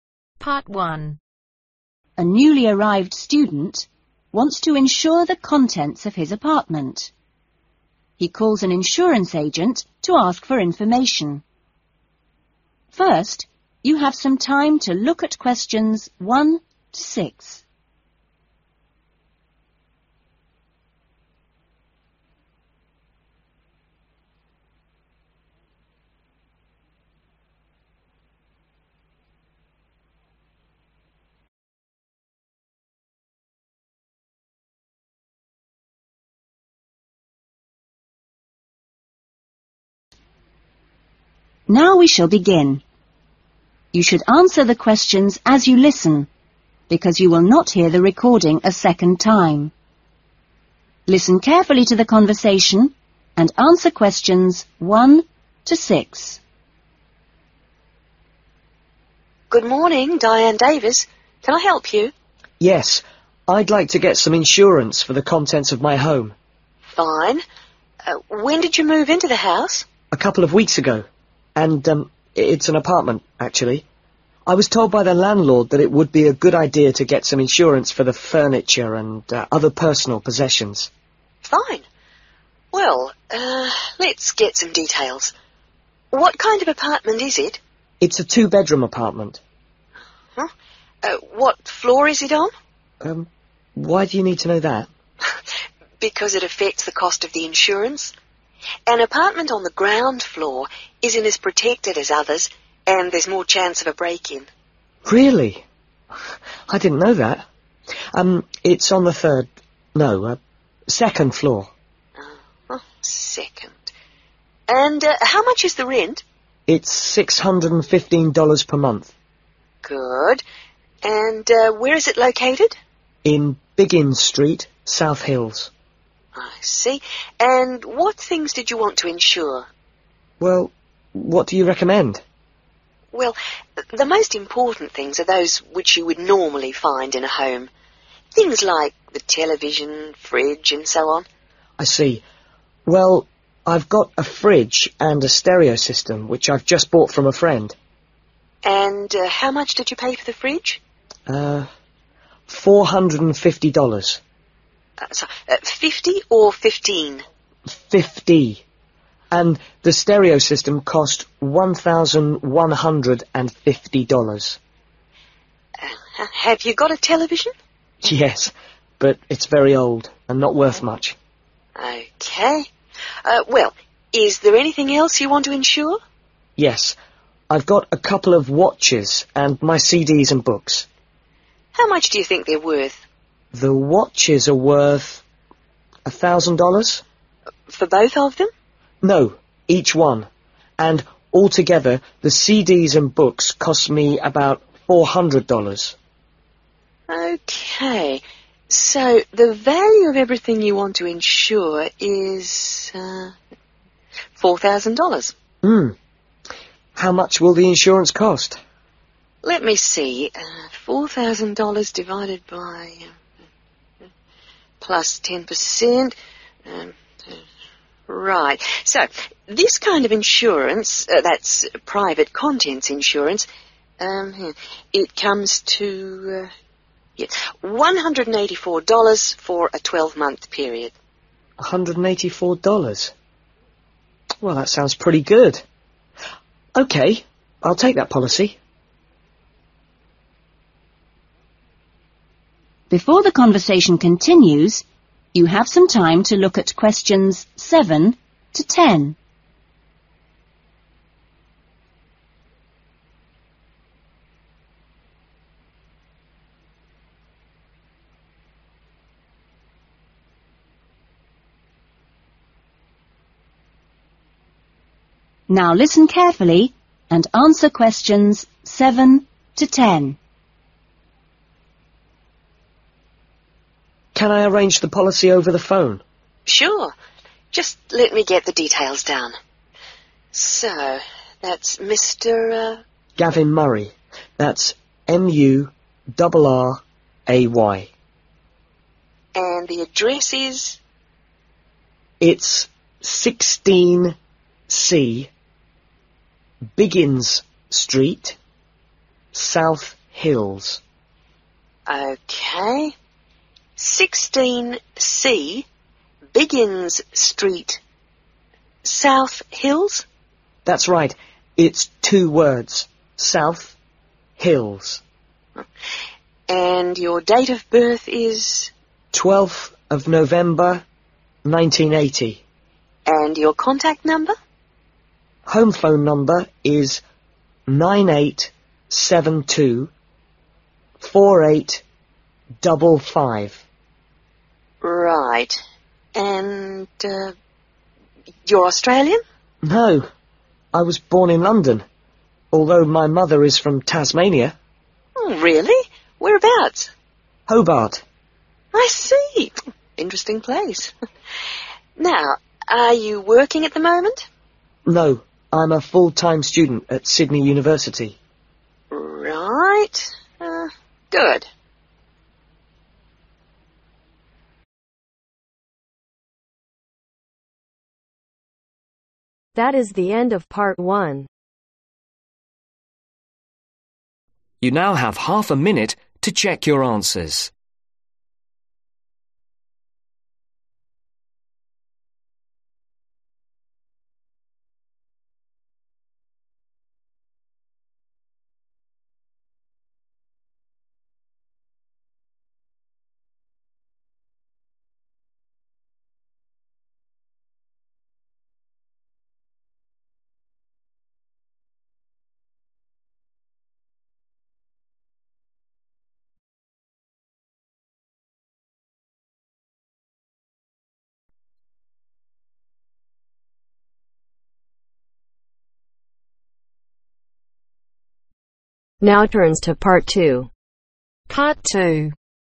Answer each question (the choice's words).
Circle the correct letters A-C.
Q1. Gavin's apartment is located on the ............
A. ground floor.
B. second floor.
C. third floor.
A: second floor.

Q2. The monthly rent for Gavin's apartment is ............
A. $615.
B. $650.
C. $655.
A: $615.

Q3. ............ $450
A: Fridge / refrigerator

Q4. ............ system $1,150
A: Stereo

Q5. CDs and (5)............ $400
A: Books

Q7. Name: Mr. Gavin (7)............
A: Murray

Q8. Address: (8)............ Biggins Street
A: 16C

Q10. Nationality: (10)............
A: English / British